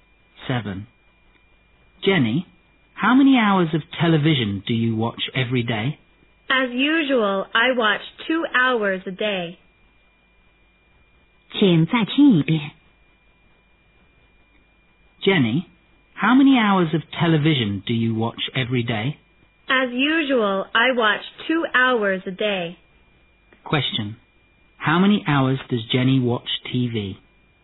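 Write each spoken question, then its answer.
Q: Question. How many hours does Jenny watch TV?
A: 2 hours a day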